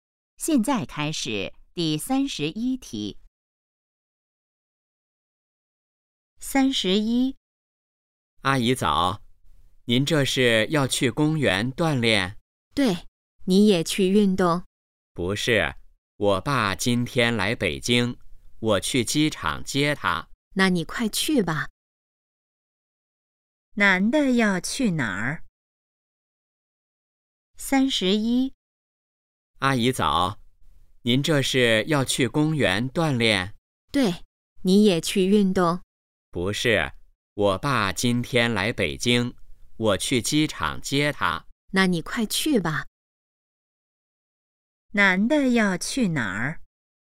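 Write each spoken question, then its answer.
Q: 男的要去哪儿?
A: 机场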